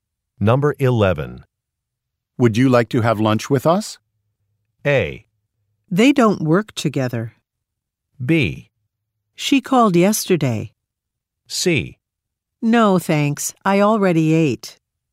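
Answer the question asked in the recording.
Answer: C: No, thanks. I already ate.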